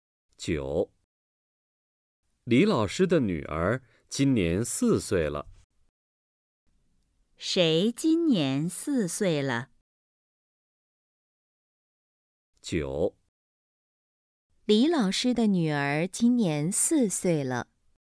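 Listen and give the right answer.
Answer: 李老师的女儿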